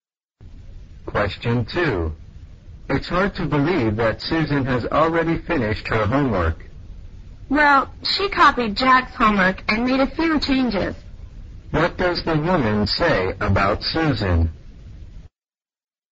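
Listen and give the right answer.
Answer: Susan copied Jack's homework and made a few changes.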